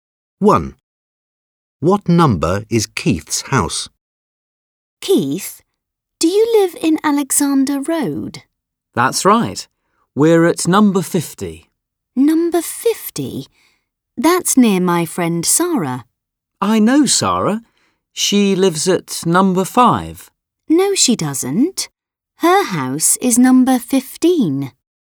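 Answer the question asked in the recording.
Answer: 50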